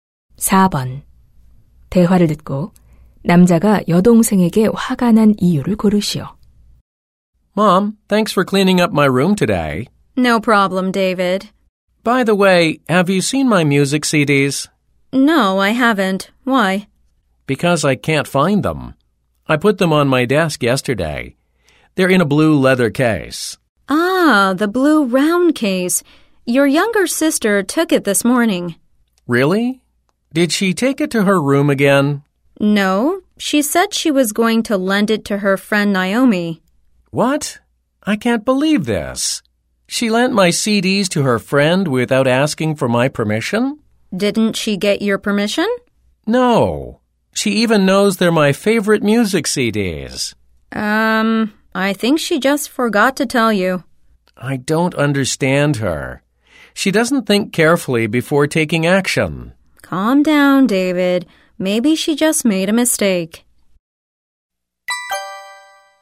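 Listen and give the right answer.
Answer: 여동생이 허락 없이 자기 CD를 친구에게 빌려줘서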